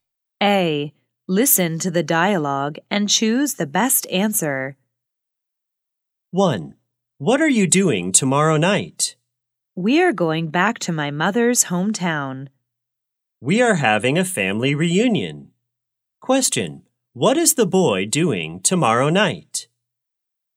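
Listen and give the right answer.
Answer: Going back to his mother's hometown for a family reunion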